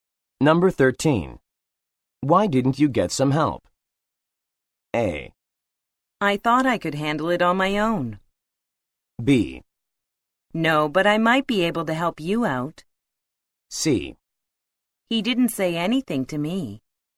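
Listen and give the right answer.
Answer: A: I thought I could handle it on my own.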